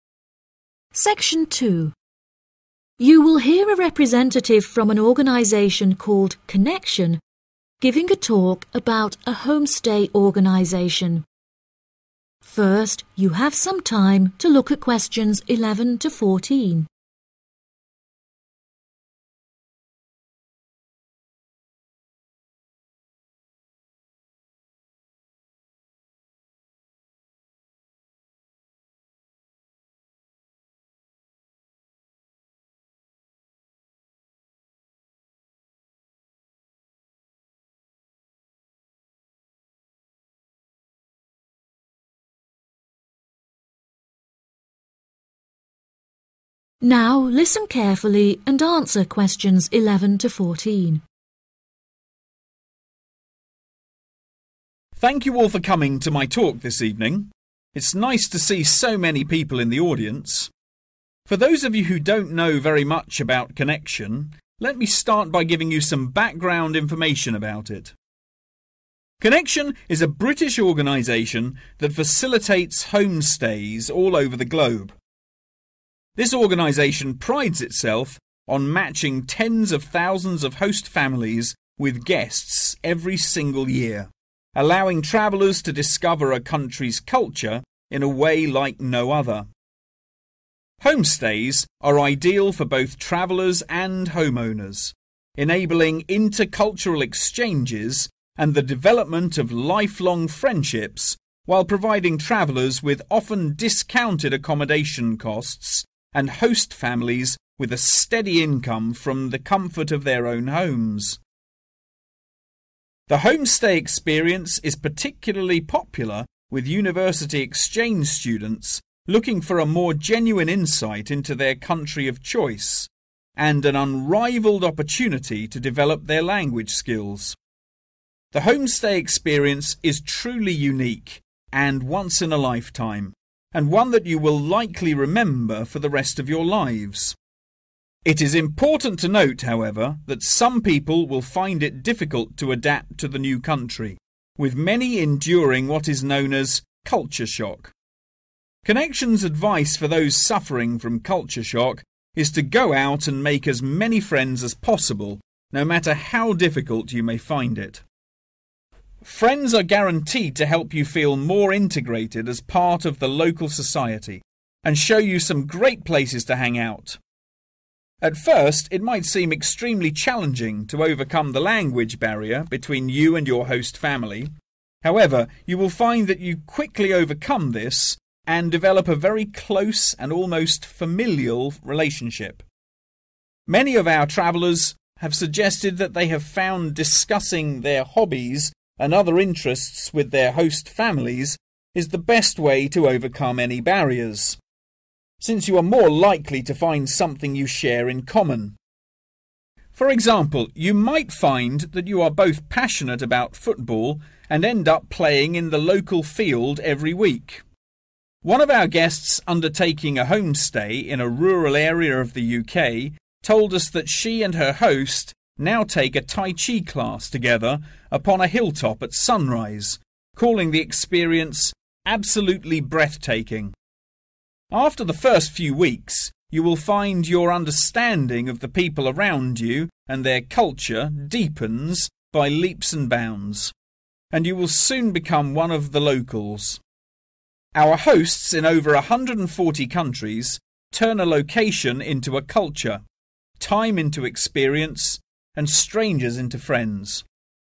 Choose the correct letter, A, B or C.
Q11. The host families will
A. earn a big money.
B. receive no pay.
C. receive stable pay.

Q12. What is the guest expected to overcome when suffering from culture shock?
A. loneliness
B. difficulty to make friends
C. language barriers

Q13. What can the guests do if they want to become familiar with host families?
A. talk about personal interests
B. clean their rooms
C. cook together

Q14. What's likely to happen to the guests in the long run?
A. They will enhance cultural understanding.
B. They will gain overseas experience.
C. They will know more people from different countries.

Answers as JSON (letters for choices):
{"11": "C", "12": "B", "13": "A", "14": "A"}